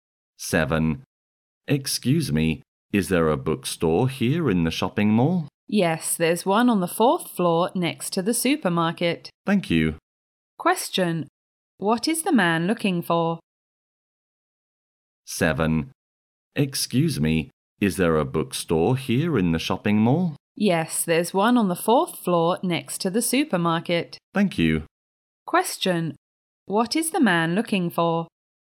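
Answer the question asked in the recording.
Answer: A bookstore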